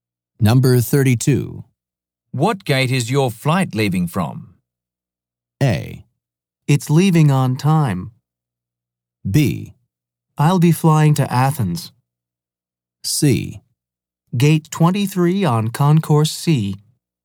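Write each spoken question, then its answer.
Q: What gate is your flight leaving from?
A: C: Gate 23 on Concourse C.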